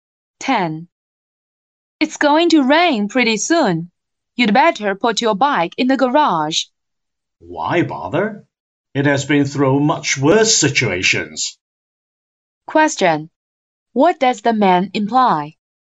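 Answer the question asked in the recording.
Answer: There's no need to put the bike in the garage.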